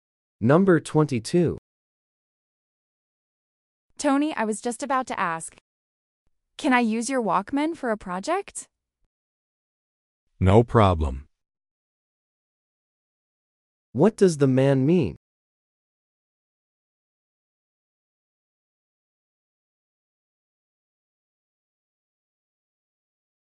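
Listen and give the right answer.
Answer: She can use his Walkman.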